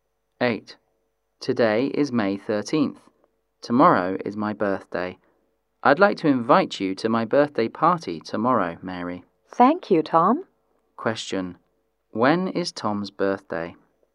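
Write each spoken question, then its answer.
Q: When is Tom's birthday?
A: May 14th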